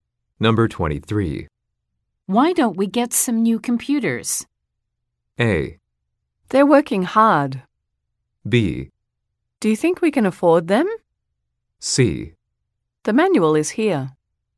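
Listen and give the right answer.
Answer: B: Do you think we can afford them?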